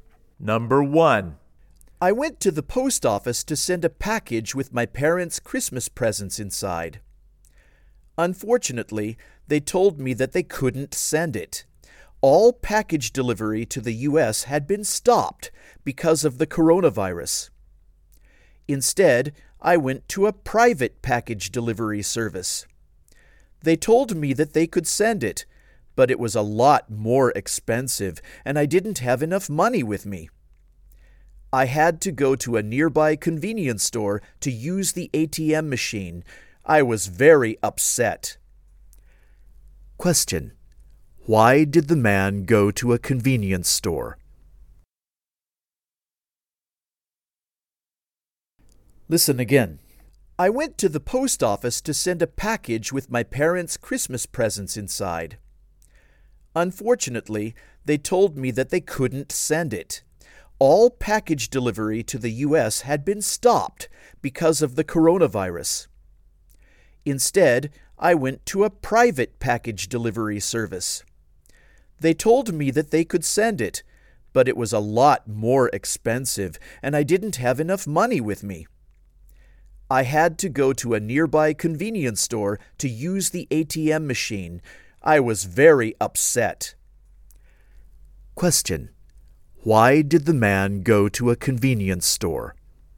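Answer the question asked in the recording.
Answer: To use the ATM because he didn't have enough money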